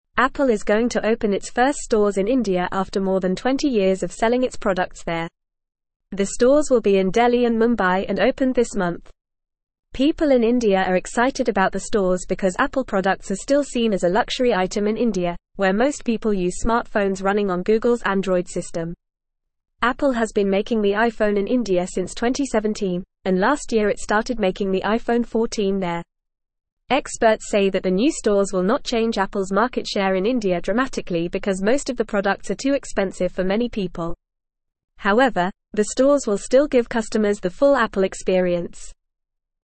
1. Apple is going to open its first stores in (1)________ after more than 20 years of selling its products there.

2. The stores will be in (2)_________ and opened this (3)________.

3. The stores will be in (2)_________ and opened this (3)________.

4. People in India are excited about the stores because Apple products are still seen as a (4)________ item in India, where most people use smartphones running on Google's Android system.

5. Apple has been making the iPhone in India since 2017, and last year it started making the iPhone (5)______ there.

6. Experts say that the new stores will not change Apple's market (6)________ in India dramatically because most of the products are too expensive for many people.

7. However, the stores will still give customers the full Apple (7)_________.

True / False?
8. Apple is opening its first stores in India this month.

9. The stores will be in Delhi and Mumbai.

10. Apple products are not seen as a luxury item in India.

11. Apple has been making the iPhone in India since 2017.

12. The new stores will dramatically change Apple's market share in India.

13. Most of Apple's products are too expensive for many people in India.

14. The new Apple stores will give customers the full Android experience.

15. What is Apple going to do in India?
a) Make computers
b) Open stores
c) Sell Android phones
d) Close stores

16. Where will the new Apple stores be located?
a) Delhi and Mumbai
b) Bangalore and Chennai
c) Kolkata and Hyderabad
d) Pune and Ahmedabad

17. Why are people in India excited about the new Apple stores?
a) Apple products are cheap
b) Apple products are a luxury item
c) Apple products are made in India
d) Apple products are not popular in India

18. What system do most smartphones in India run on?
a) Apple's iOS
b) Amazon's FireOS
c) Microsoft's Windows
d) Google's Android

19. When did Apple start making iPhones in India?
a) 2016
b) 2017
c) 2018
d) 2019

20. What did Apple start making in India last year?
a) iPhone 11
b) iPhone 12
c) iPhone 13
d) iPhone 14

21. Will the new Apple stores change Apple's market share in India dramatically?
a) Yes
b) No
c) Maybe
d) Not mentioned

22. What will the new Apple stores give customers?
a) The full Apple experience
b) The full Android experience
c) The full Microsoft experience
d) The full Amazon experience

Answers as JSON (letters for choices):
{"1": "India", "2": "Delhi and Mumbai", "3": "month", "4": "luxury", "5": "14", "6": "share", "7": "experience", "8": "True", "9": "True", "10": "False", "11": "True", "12": "False", "13": "True", "14": "False", "15": "b", "16": "a", "17": "b", "18": "d", "19": "b", "20": "d", "21": "b", "22": "a"}

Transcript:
Apple is going to open its first stores in India after more than 20 years of selling its products there. The stores will be in Delhi and Mumbai and opened this month. People in India are excited about the stores because Apple products are still seen as a luxury item in India, where most people use smartphones running on Google's Android system. Apple has been making the iPhone in India since 2017, and last year it started making the iPhone 14 there. Experts say that the new stores will not change Apple's market share in India dramatically because most of the products are too expensive for many people. However, the stores will still give customers the full Apple experience.

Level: Level 1